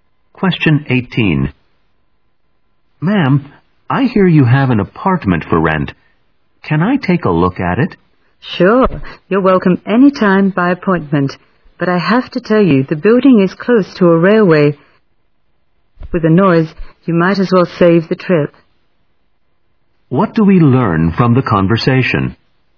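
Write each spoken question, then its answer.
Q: What do we learn from the conversation?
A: The woman suggests the apartment may not suit him because of railway noise.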